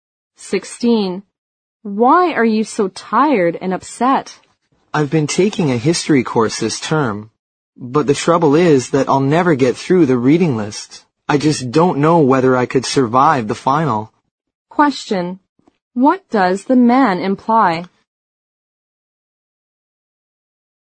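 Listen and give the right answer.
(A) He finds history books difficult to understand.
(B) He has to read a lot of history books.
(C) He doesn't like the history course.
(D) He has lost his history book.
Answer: (B) He has to read a lot of history books.

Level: 六级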